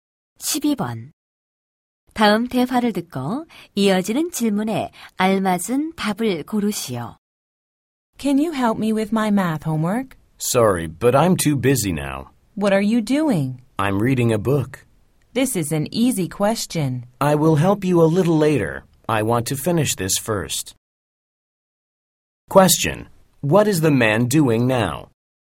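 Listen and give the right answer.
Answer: He is reading a book.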